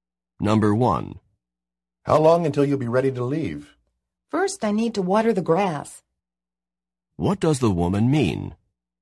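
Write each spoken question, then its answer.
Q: What does the woman mean?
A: She has to water the grass before she can leave.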